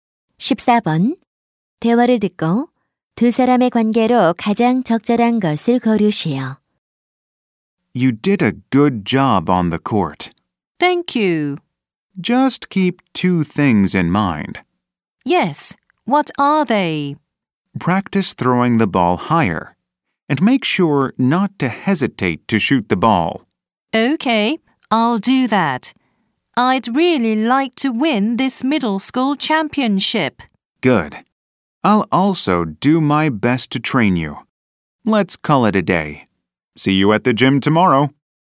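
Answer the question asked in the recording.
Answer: 농구 코치와 선수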